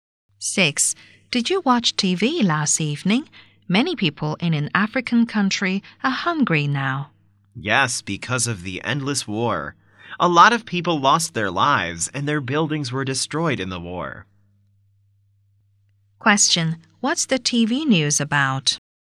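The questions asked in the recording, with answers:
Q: What's the TV news about?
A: People going hungry in an African country because of war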